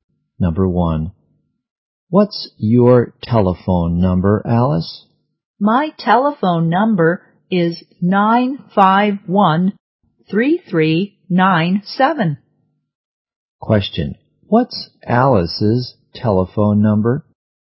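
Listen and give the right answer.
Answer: 951-3397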